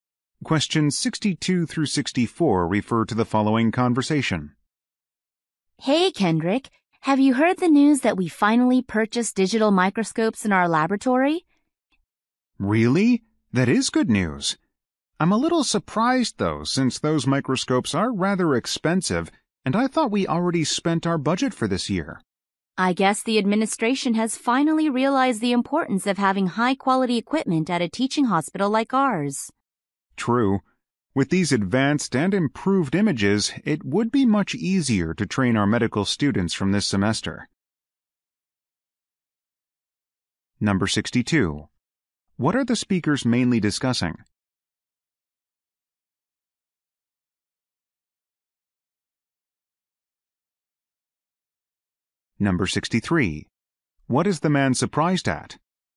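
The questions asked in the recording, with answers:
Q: What are the speakers mainly discussing?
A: New digital microscopes for the laboratory

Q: What is the man surprised at?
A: That they bought expensive microscopes when the budget was spent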